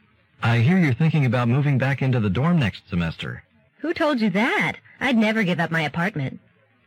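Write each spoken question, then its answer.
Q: What does the woman mean?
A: She has no plans to move back into the dorm; she will keep her apartment.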